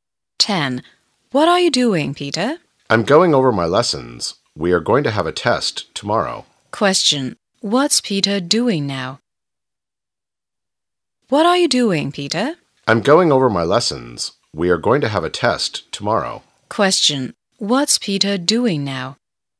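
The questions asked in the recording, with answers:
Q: What's Peter doing now?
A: Going over his lessons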